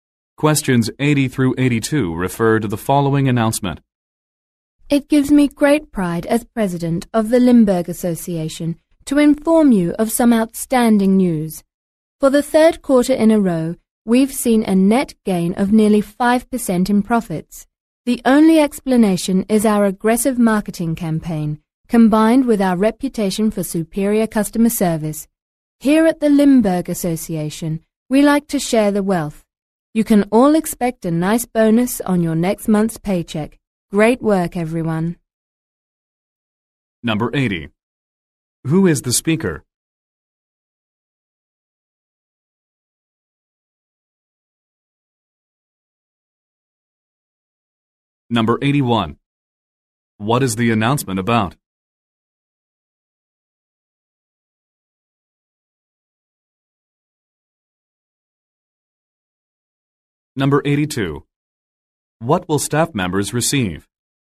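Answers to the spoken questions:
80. The president of the Limburg Association
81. A gain in profits
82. A bonus on next month's paycheck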